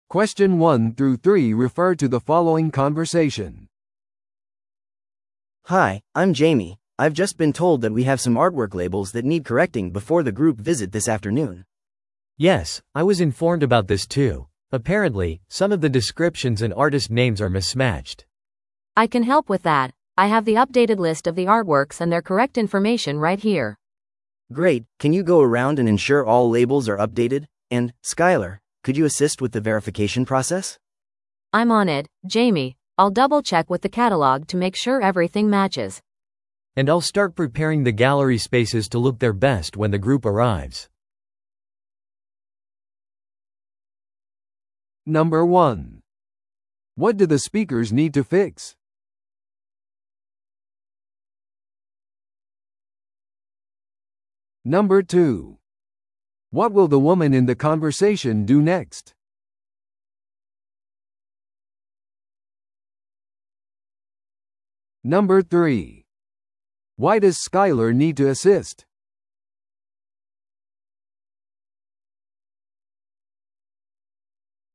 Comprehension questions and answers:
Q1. What do the speakers need to fix?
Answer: アートワークのラベル

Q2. What will the woman in the conversation do next?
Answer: 更新されたラベルをカタログと照らし合わせて確認する

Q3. Why does Skyler need to assist?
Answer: ラベルの更新と確認を手伝う

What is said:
A: Hi, I'm Jamie, I've just been told that we have some artwork labels that need correcting before the group visit this afternoon.
B: Yes, I was informed about this too. Apparently, some of the descriptions and artist names are mismatched.
C: I can help with that, I have the updated list of the artworks and their correct information right here.
A: Great, can you go around and ensure all labels are updated? And, Skyler, could you assist with the verification process?
C: I'm on it, Jamie. I'll double-check with the catalog to make sure everything matches.
B: And I'll start preparing the gallery spaces to look their best when the group arrives.